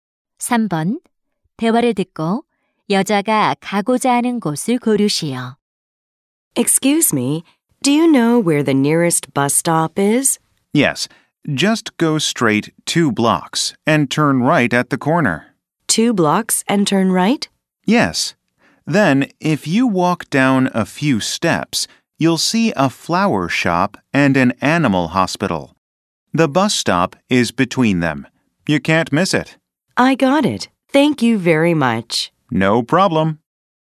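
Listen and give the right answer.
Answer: 버스 정류장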